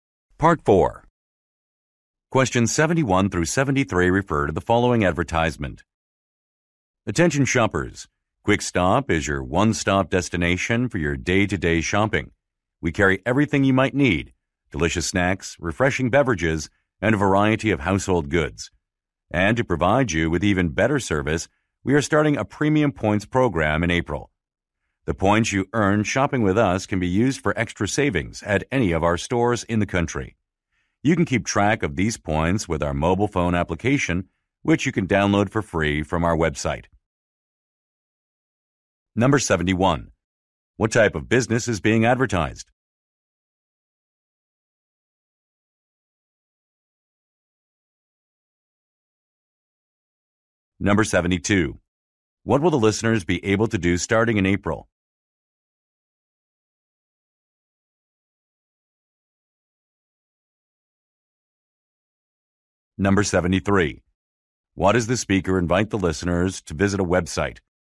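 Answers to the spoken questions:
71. A convenience store
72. Earn points in a premium points program for extra savings
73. To download a free mobile app to track points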